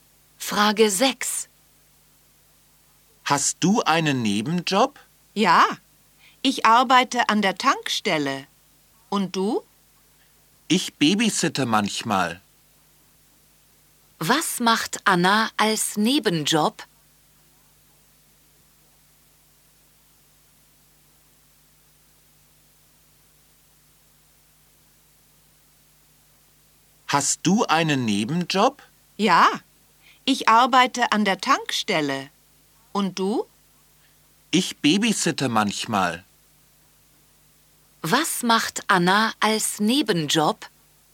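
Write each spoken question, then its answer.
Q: Was macht Anna als Nebenjob?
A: Sie babysittet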